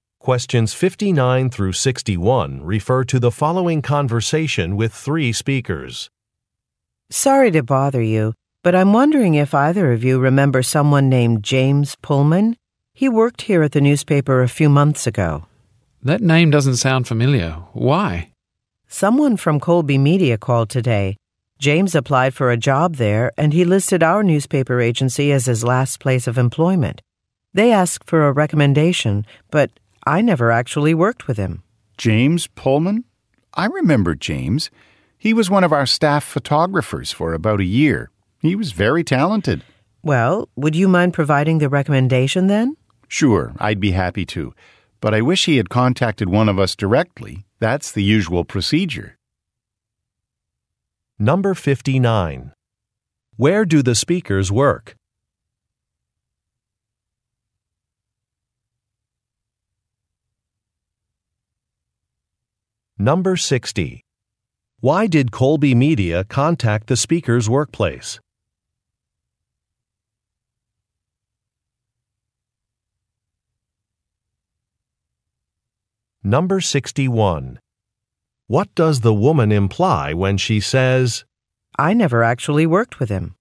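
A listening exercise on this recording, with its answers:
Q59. Where do the speakers work?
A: At a newspaper

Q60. Why did Colby Media contact the speakers' workplace?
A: To ask for a reference

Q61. What does the woman imply when she says, "I never actually worked with him"?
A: She cannot fulfill a request.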